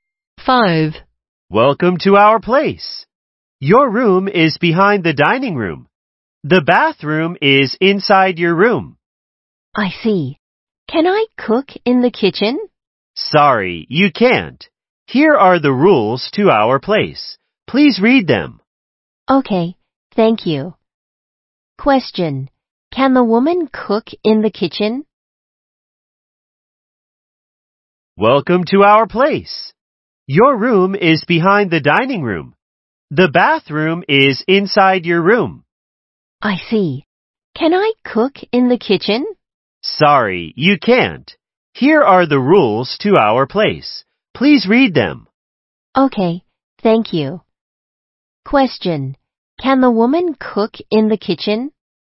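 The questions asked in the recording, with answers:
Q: Can the woman cook in the kitchen?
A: No, she can't.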